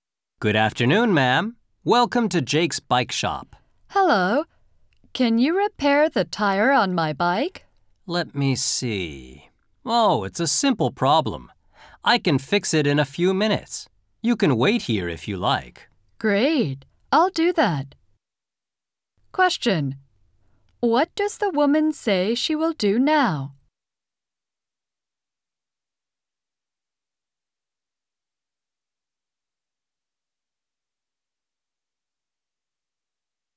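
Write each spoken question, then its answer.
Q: What does the woman say she will do now?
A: Wait at the bike shop while the tire is fixed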